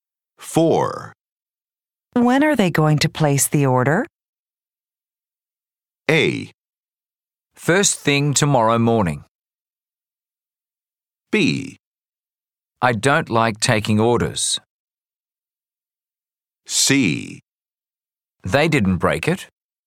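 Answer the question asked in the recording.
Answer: A: First thing tomorrow morning.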